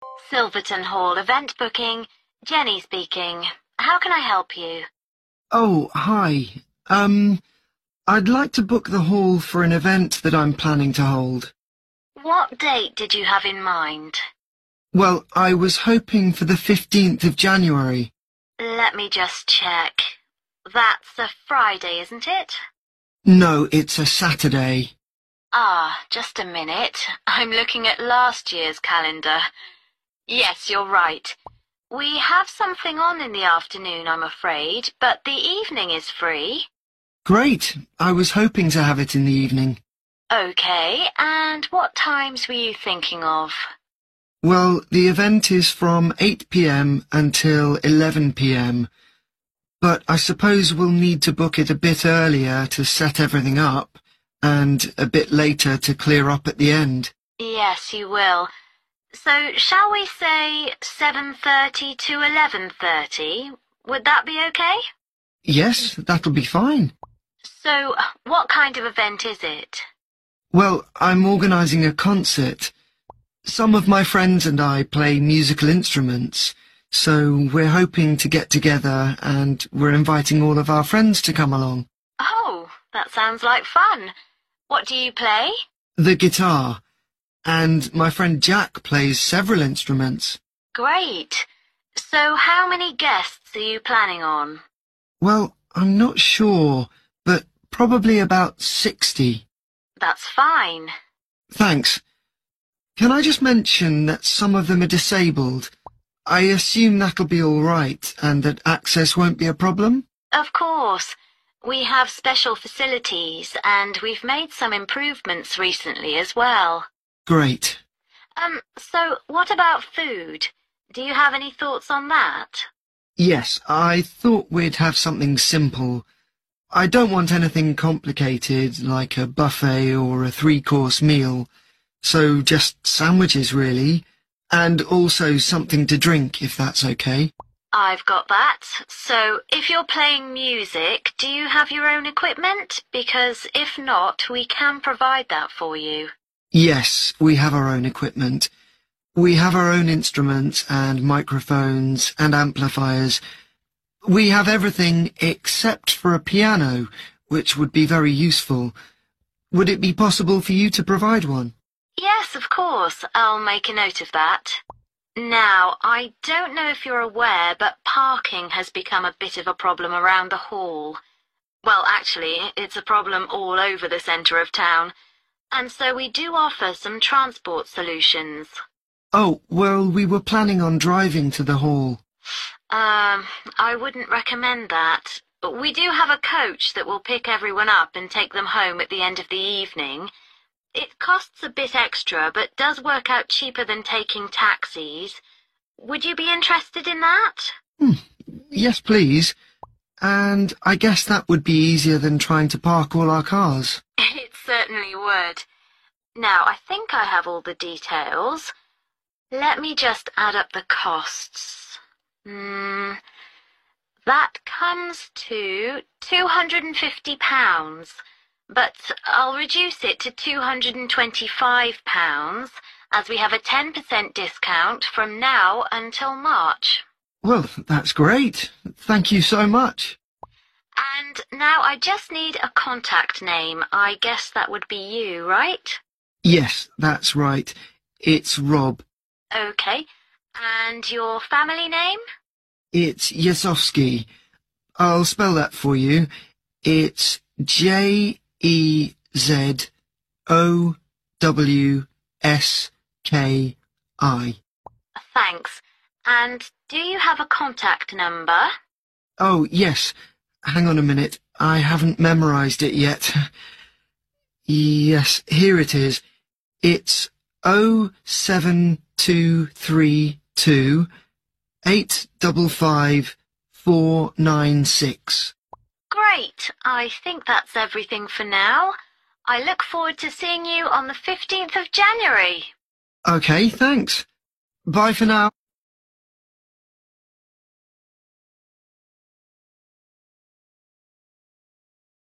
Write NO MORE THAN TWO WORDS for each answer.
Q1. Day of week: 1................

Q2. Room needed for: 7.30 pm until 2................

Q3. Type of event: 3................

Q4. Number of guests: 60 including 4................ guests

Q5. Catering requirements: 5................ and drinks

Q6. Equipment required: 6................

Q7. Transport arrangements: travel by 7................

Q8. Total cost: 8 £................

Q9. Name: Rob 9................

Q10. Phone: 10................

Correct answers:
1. saturday
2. 11.30 pm
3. (music) concert
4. disabled
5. sandwiches
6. piano
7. coach
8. 225
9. JEZOWSKI
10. 07232855496